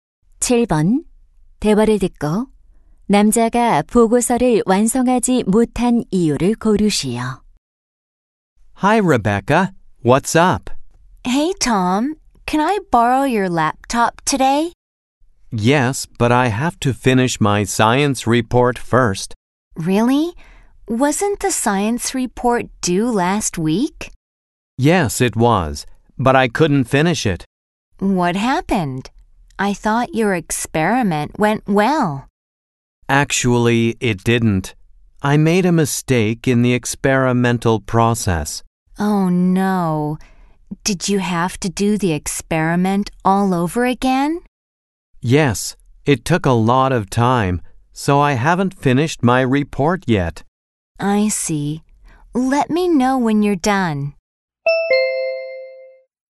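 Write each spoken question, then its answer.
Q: 대화를 듣고 남자가 보고서를 완성하지 못한 이유를 고르시오.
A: 실험 과정에서 실수를 해서 실험을 다시 해야 했기 때문에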